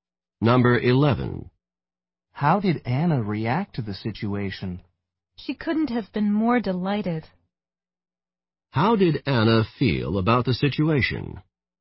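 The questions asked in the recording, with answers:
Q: How did Anna feel about the situation?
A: Extremely delighted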